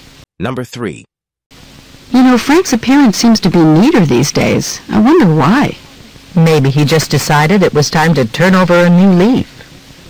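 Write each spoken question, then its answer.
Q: What can be inferred about Frank?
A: He has decided to change his habits for the better.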